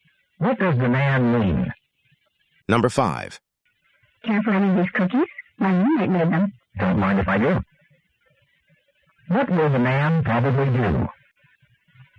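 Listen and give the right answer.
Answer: Have some of the cookies.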